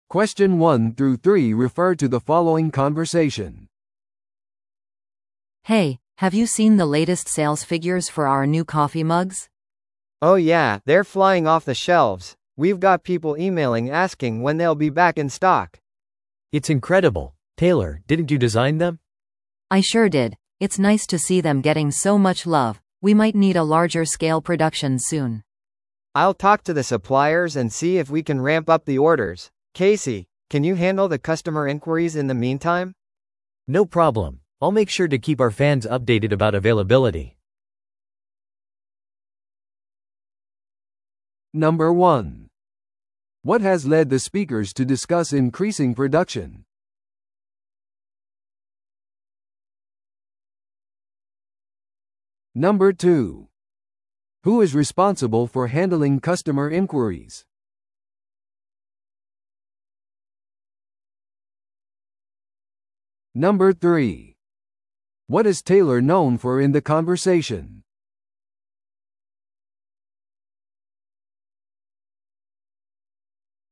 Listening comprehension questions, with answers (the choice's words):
Listen to the audio below and answer the questions.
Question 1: What has led the speakers to discuss increasing production?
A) 新しいオフィスの開設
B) 新しいコーヒーマグへの需要が高い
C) 社内デザインコンペ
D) これからの会社のパーティー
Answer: 新しいコーヒーマグへの需要が高い

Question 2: Who is responsible for handling customer inquiries?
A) テイラー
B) その女性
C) ケーシー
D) メール対応チーム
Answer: ケーシー

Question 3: What is Taylor known for in the conversation?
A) 人気の新しいコーヒーマグをデザインする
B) メールの対応をする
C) 会社の財務数字を管理する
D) オフィス用品を注文する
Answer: 人気の新しいコーヒーマグをデザインする

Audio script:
A: Hey, have you seen the latest sales figures for our new coffee mugs?
B: Oh yeah, they're flying off the shelves! We've got people emailing asking when they'll be back in stock.
C: It's incredible. Taylor, didn't you design them?
A: I sure did. It's nice to see them getting so much love. We might need a larger scale production soon.
B: I'll talk to the suppliers and see if we can ramp up the orders. Casey, can you handle the customer inquiries in the meantime?
C: No problem. I'll make sure to keep our fans updated about availability.